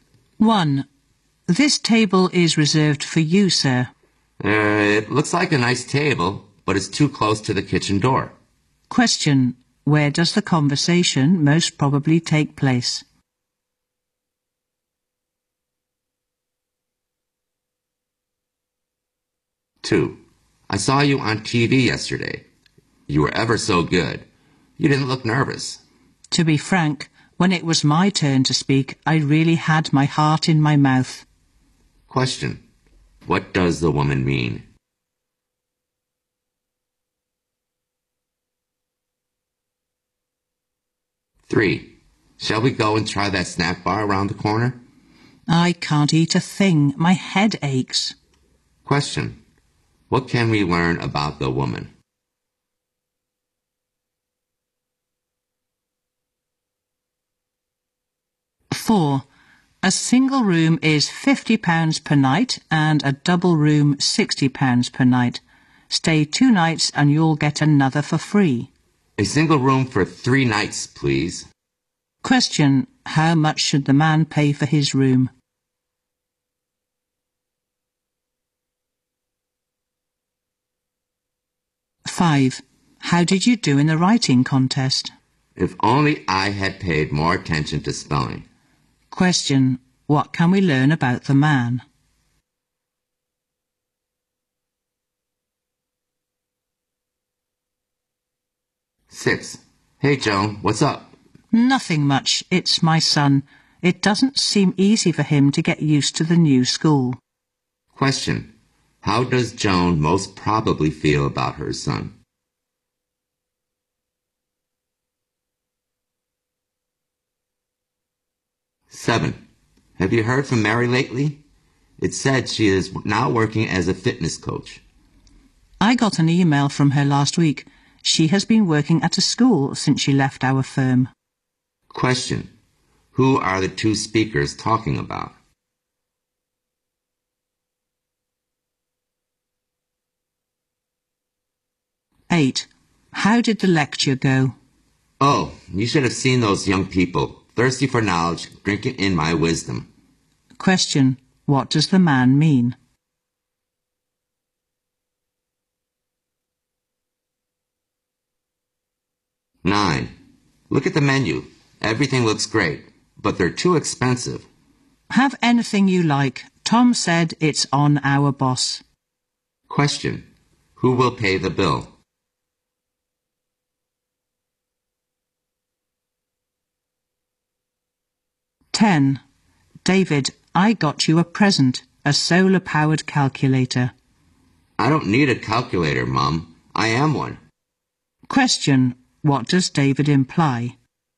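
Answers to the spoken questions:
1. In a restaurant
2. She was actually very nervous
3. She has a headache and doesn't feel like eating
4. £100
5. He made spelling mistakes and didn't do well
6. Worried
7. Mary, their former colleague
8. The lecture went well; the audience was eager to learn
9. Their boss
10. He is good at calculating and doesn't need a calculator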